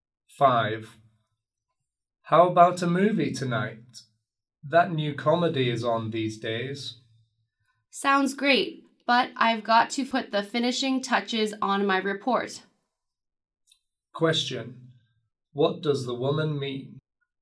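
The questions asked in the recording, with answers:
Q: Question, what does the woman mean?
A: She can't go because she must finish her report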